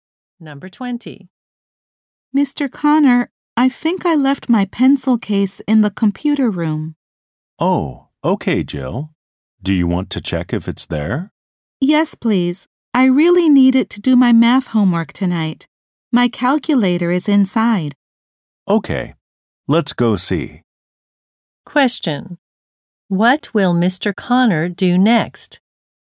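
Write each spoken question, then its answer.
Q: What will Mr. Connor do next?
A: Go to the computer room with Jill to look for her pencil case.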